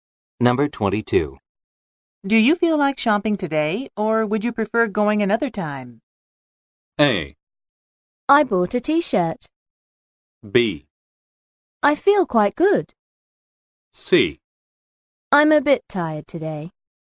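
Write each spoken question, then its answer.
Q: Do you feel like shopping today, or would you prefer going another time?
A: C: I'm a bit tired today.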